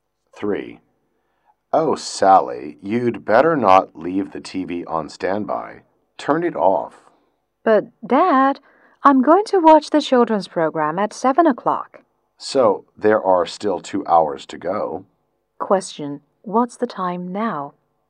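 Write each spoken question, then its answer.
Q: Question, what's the time now?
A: 5 o'clock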